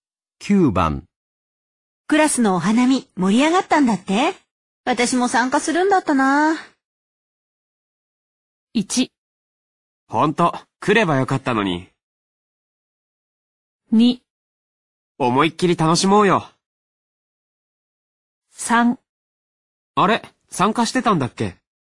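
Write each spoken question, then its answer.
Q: クラスのお花見盛り上がったんだって?私も参加するんだったな。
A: 1: ほんと、来ればよかったのに。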